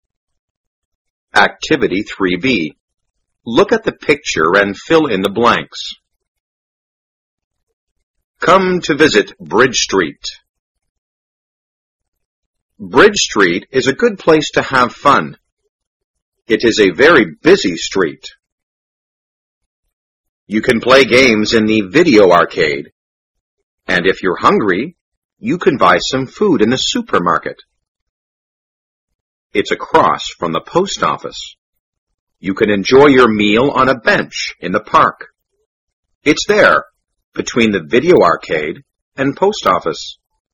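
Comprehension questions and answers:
Activity 3b.Look at the picture and fill in the blanks.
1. Bridge Street is a good place to have fun It is a very___street.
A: busy

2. You can play games in the___.And if you're hungry,you can buy some food in the ___.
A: video arcade; supermarket

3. It's__the post office.You can enjoy your meal on a bench in the park.It's there,between the___and___.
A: across from; video arcade; post office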